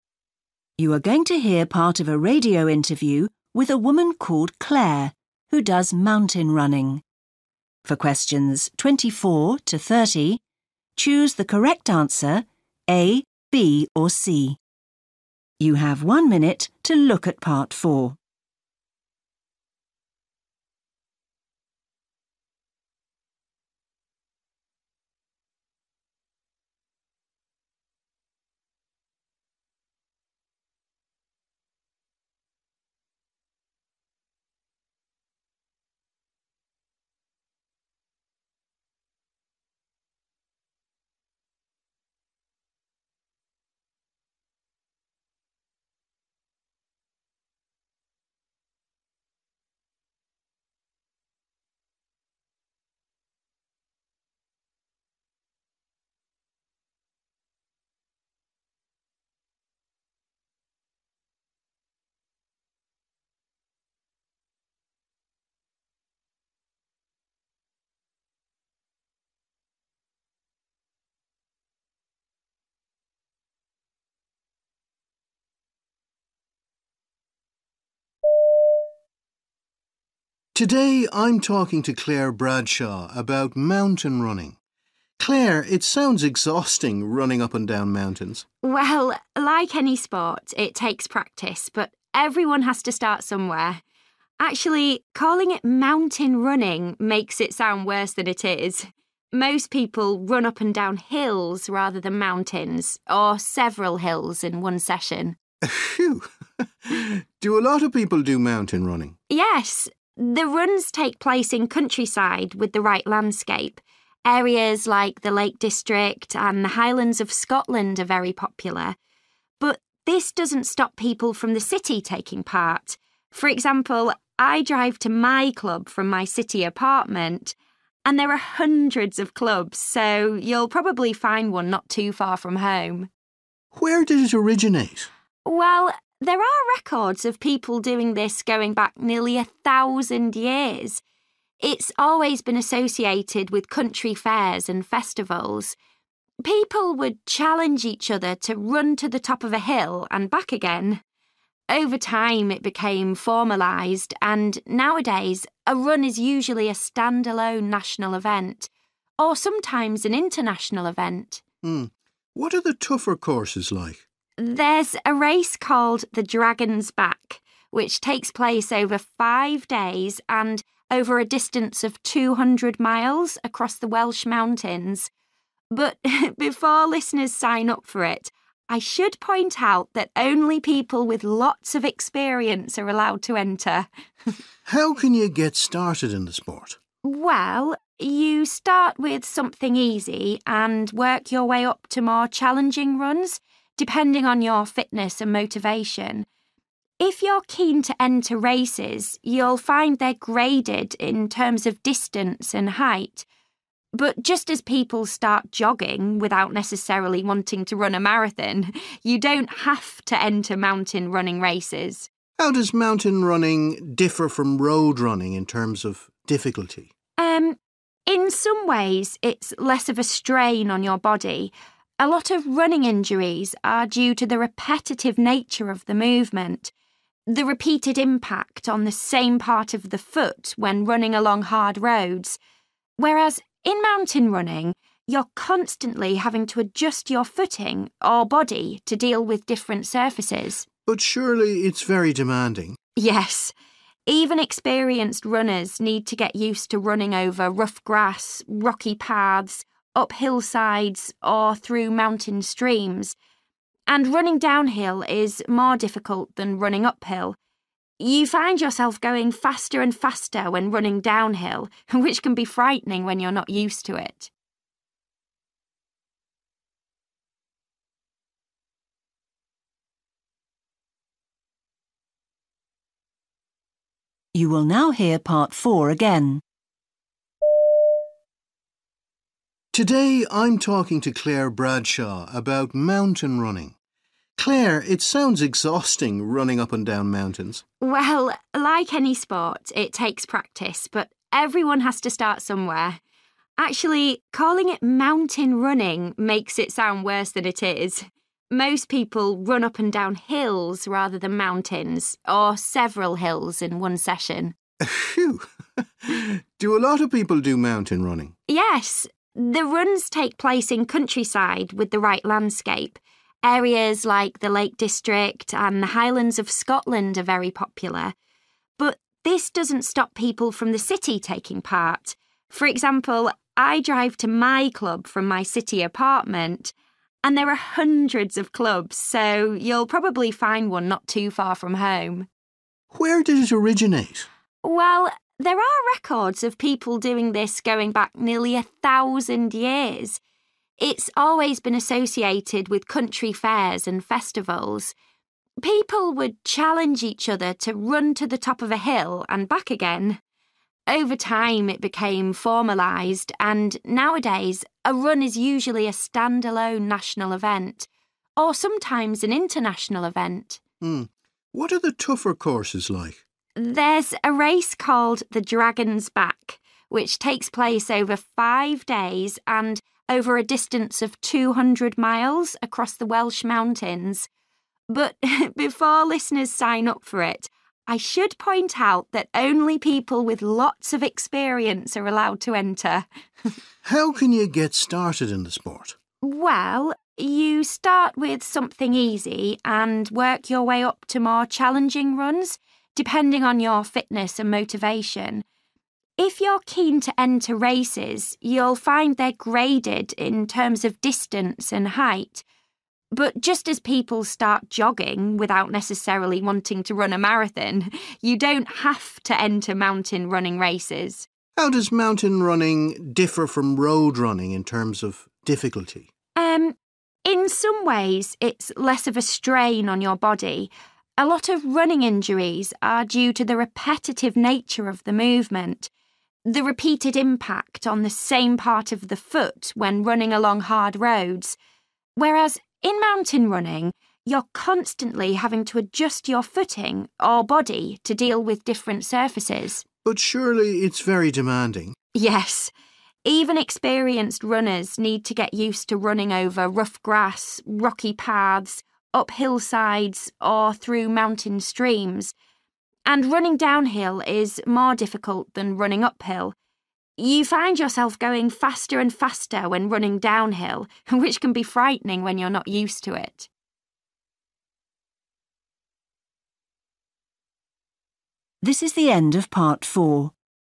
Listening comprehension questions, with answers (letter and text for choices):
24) What does Claire say about mountain running?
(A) The name is a little misleading.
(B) It is worse than you can imagine.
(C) It is exhausting and time-consuming.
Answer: (A) The name is a little misleading.

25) People who live in the city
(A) prefer running in the Lake District and the Highlands of Scotland.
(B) must be able to drive to get to the countryside.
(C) can probably find a mountain running club near their home.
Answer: (C) can probably find a mountain running club near their home.

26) Currently, most mountain running races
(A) are held at fairs or during festivals.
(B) are independent sporting events.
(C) have participants from many countries.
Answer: (B) are independent sporting events.

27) The Dragon's Back race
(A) is open to anyone who wants to sign up.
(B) is not as challenging as some other courses.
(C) only allows certain people to do the run.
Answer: (C) only allows certain people to do the run.

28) What does Claire say about participating in races?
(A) People shouldn't feel obliged to do them.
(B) They are only suitable for people who are very fit.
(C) They help you to stay motivated.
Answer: (A) People shouldn't feel obliged to do them.

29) What does Claire say about road running?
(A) Runners don't have the chance to appreciate nature.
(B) It is harder than mountain running.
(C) Runners are more likely to suffer certain injuries.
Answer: (C) Runners are more likely to suffer certain injuries.

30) According to Claire, experienced road runners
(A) find the uneven surface of mountain running a challenge.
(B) can adapt to mountain running quickly.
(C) will be able to run faster than they think.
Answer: (A) find the uneven surface of mountain running a challenge.

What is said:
Presenter: Today I'm talking to Claire Bradshaw about mountain running. Claire, it sounds exhausting, running up and down mountains.
Claire: Well, like any sport, it takes practice but everyone has to start somewhere. Actually, calling it 'mountain running' makes it sound worse than it is. Most people run up and down hills rather than mountains – or several hills in one session.
Presenter: Whew! Do a lot of people do mountain running?
Claire: Yes. The runs take place in countryside with the right landscape – areas like the Lake District and the Highlands of Scotland are very popular. But this doesn't stop people from the city talking part. For example, I drive to my club from my city apartment. And there are hundreds of clubs so you'll probably find one not too far from home.
Presenter: Where did it originate?
Claire: Well, there are records of people doing this going back nearly a thousand years. It's always been associated with country fairs and festivals. People would challenge each other to run to the top of a hill and back again. Over time it became formalised and nowadays a run is usually a stand-alone national event. Or sometimes an international event.
Presenter: Hmm. What are the tougher courses like?
Claire: There's a race called The Dragon's Back, which takes place over five days and over a distance of 200 miles across the Welsh mountains. But before listeners sign up for it, I should point out that only people with lots of experience are allowed to enter.
Presenter: How can you get started in the sport?
Claire: Well, you start with something easy and work your way up to more challenging runs, depending on your fitness and motivation. If you're keen to enter races, you'll find they're graded in terms of distance and height. But just as people start jogging without necessarily wanting to run a marathon, you don't have to enter mountain running races.
Presenter: How does mountain running differ from road running in terms of difficulty?
Claire: Um, in some ways, it's less of a strain on your body. A lot of running injuries are due to the repetitive nature of the movement, the repeated impact on the same part of the foot when running along hard roads, whereas in mountain running, you're constantly having to adjust your footing or body to deal with different surfaces.
Presenter: But surely it's very demanding?
Claire: Yes. Even experienced runners need to get used to running over rough grass, rocky paths, up hillsides or through mountain streams. And running downhill is more difficult than running uphill. You find yourself going faster and faster when running downhill, which can be frightening when you're not used to it.

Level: FCE (B2)